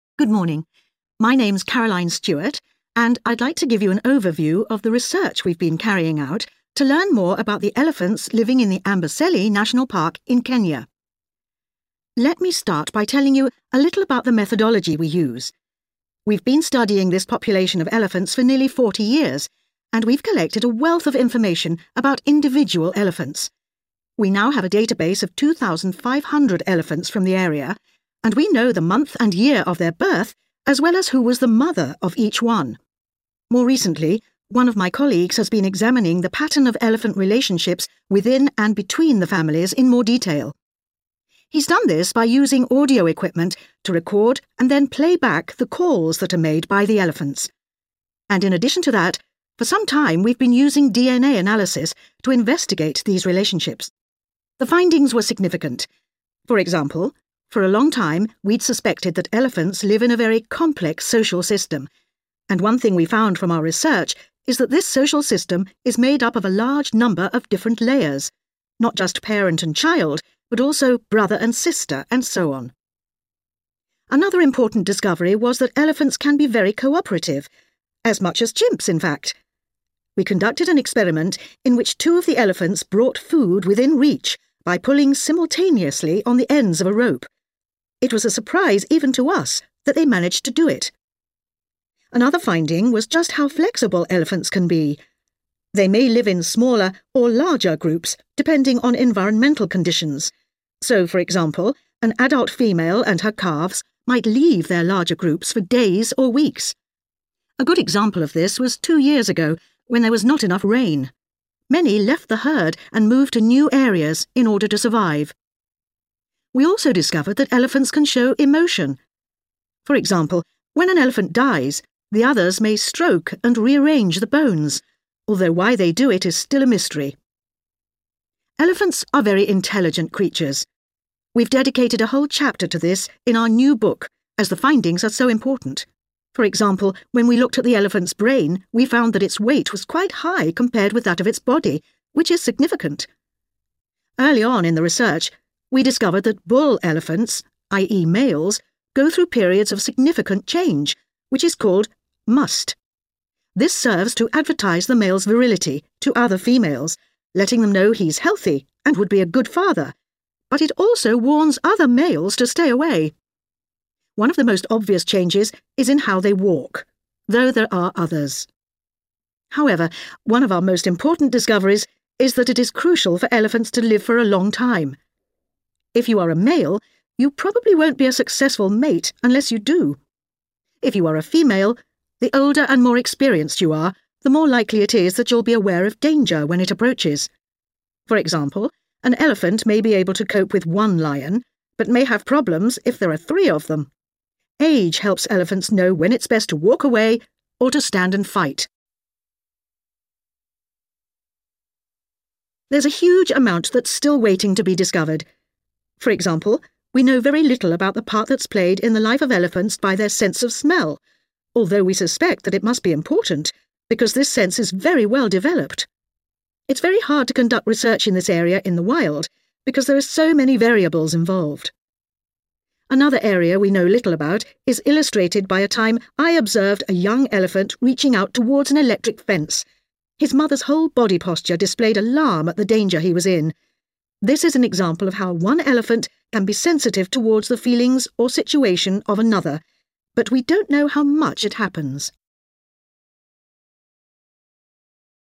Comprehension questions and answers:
Complete the notes below. Write ONE WORD ONLY for each answer.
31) Records of many elephants' dates of birth and also of their 31............... have been kept.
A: mother

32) The social system of elephants has many 32...............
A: layers

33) Two elephants worked together to get food using a 33...............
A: rope

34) Some moved to a new area when there was a lack of 34...............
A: rain

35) They may move the 35............... of another elephant after death.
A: bones

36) Their brain 36............... is quite high in comparison with that of their body.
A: weight

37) The way they 37............... is one obvious change.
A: walk

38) Older males make better mates: older females recognize 38...............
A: danger

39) How elephants use smell-difficult to study this in the 39...............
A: wild

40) How 40............... elephants are to one another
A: sensitive